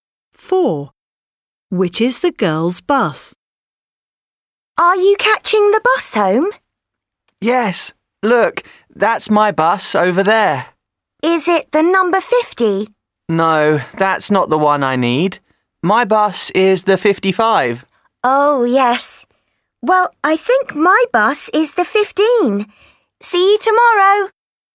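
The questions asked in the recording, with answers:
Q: Which is the girl's bus?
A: The number 55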